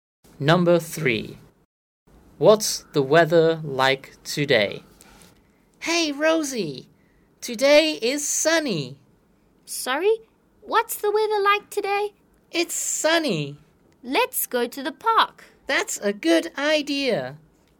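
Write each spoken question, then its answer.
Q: What's the weather like today?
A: sunny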